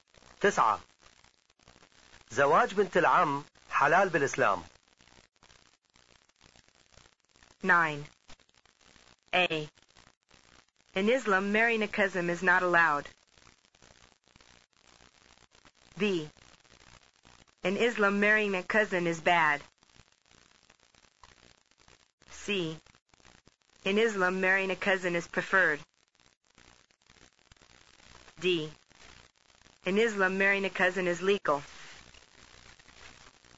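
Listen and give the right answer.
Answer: D: In Islam, marrying a cousin is legal.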